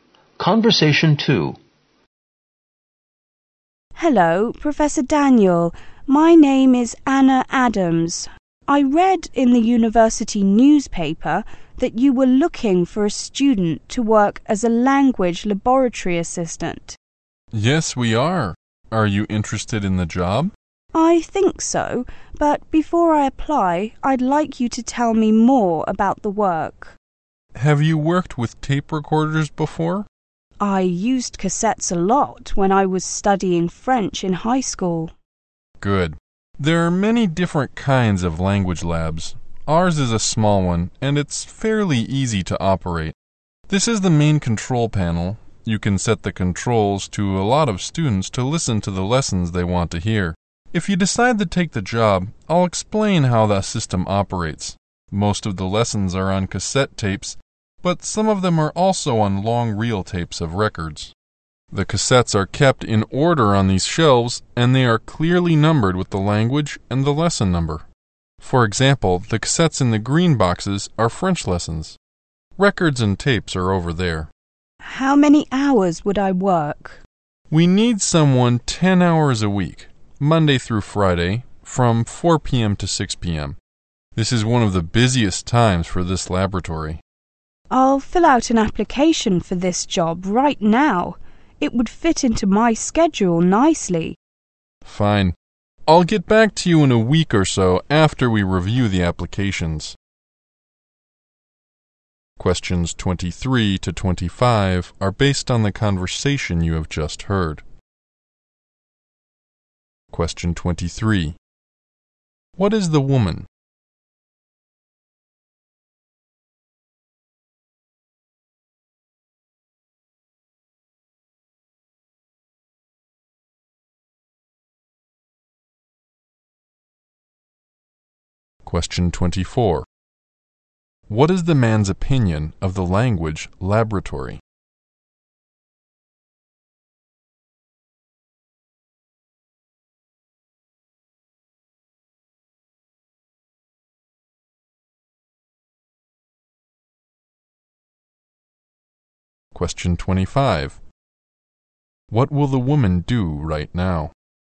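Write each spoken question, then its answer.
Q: What is the woman?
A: A university student

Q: What is the man's opinion of the language laboratory?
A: It is small and fairly easy to operate

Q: What will the woman do right now?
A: Fill out an application for the job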